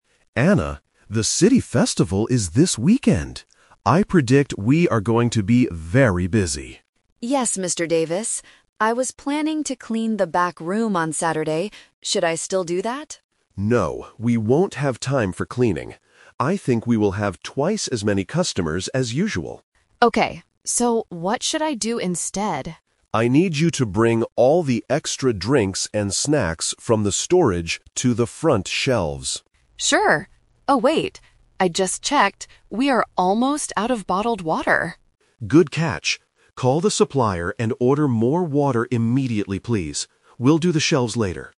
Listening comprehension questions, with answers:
Listen to the conversation between a store manager and an employee. Choose the correct answer (A, B, or C).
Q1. What was Anna planning to do on Saturday at first?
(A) Clean the back room.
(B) Organize the front shelves.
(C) Go to the city festival.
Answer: (A) Clean the back room.

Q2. What does Mr. Davis predict for the weekend?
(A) They will run out of snacks.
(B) They will have a lot more customers.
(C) The store will close early.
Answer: (B) They will have a lot more customers.

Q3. What does Anna have to do immediately?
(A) Move drinks to the front shelves.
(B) Clean the storage room.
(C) Order more bottled water.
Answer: (C) Order more bottled water.

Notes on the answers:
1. Anna clearly says, "I was planning to clean the back room on Saturday." Trap: Option (B) is the manager's new instruction, not her original plan. Option (C) is a trap because the "city festival" is mentioned, but she is not going there; she has to work.
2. Mr. Davis predicts, "I think we will have twice as many customers as usual." Trap: Option (A) is a trap. They mention "snacks", and they actually run out of "water", but the manager doesn't predict running out of snacks. Option (C) is not mentioned in the audio.
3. Because they are almost out of water, Mr. Davis tells her to "Call the supplier and order more water immediately". Trap: Option (A) is the classic "Twist" trap. Moving drinks to the front shelves was the plan just a few seconds ago, but the manager changes his mind and says, "We'll do the shelves later." Option (B) is the rejected plan from the beginning of the conversation.

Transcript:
Mr. Davis: Anna, the city festival is this weekend. I predict we are going to be very busy.
Anna: Yes, Mr. Davis. I was planning to clean the back room on Saturday. Should I still do that?
Mr. Davis: No, we won't have time for cleaning. I think we will have twice as many customers as usual.
Anna: Okay. So, what should I do instead?
Mr. Davis: I need you to bring all the extra drinks and snacks from the storage to the front shelves.
Anna: Sure. Oh, wait... I just checked. We are almost out of bottled water!
Mr. Davis: Good catch! Call the supplier and order more water immediately, please. We'll do the shelves later.

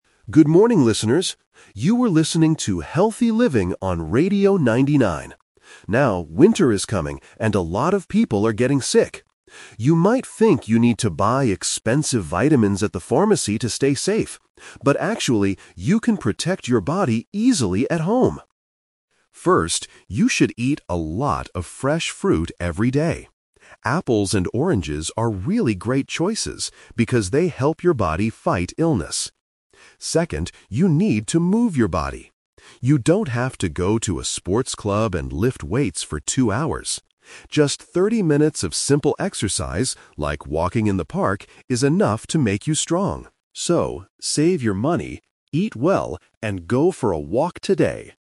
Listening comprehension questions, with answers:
Listen to a health expert talking on the radio. Choose the correct answer (A, B, or C) for each question.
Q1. According to the speaker, what do people NOT need to buy?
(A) Fresh apples and oranges.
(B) Expensive vitamins.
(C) A new pair of walking shoes.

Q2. What kind of food does the expert tell people to eat?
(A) Hot soup and bread.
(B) Medicine from the pharmacy.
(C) Fresh fruit every day.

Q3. How much exercise does the speaker recommend?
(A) Exactly thirty minutes.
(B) Two hours at a sports club.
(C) A few hours in the morning.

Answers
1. (B) Expensive vitamins.
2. (C) Fresh fruit every day.
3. (A) Exactly thirty minutes.

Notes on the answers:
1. The speaker says, "You might think you need to buy expensive vitamins... But actually, you can protect your body easily at home" and later says "save your money". This means you don't need to buy them.
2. The expert clearly says, "First, you should eat a lot of fresh fruit every day."
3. The speaker explicitly says, "Just thirty minutes of simple exercise... is enough to make you strong."

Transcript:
Speaker: Good morning, listeners! You are listening to 'Healthy Living' on Radio 99. Now, winter is coming, and a lot of people are getting sick. You might think you need to buy expensive vitamins at the pharmacy to stay safe. But actually, you can protect your body easily at home.
First, you should eat a lot of fresh fruit every day. Apples and oranges are really great choices because they help your body fight illness. Second, you need to move your body. You don't have to go to a sports club and lift weights for two hours. Just thirty minutes of simple exercise, like walking in the park, is enough to make you strong. So, save your money, eat well, and go for a walk today!

